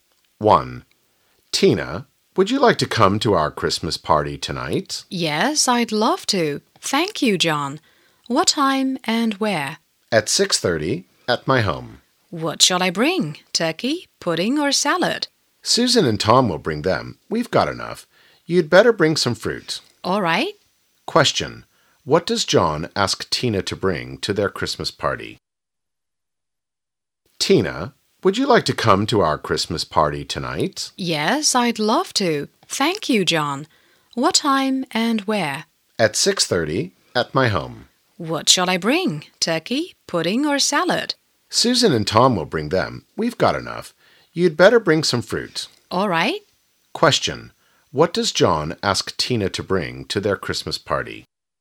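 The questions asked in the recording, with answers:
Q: What does John ask Tina to bring to their Christmas party?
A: Some fruit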